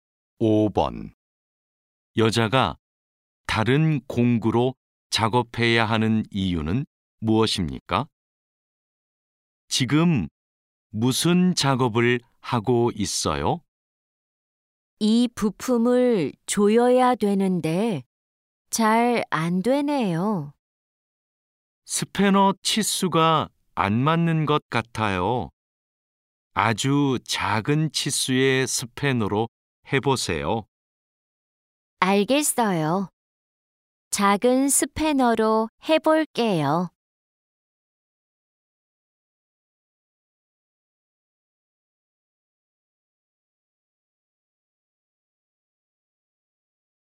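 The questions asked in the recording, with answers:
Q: 여자가 다른 공구로 작업해야 하는 이유는 무엇입니까?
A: 스패너 치수가 맞지 않아서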